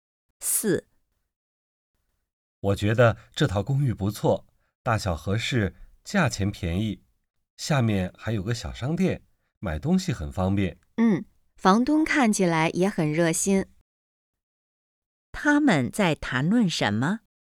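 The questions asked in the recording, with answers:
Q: 他们在谈论什么?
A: 一套公寓(租房子)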